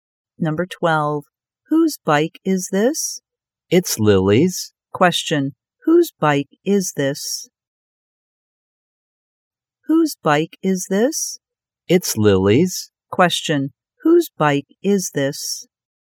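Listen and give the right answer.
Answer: Lily's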